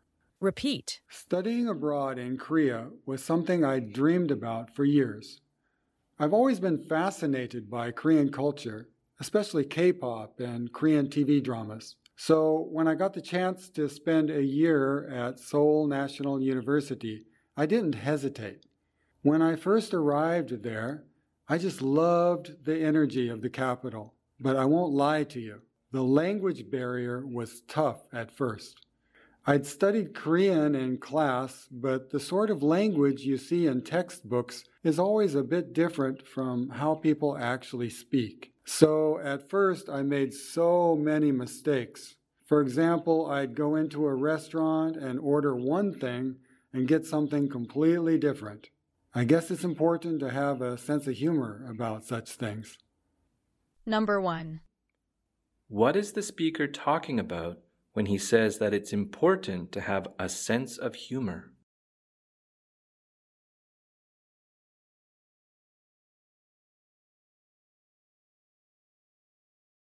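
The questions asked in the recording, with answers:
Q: What is the speaker talking about when he says that it's important to have a sense of humor?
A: The mistakes he made because of the language barrier, such as ordering one thing in a restaurant and getting something completely different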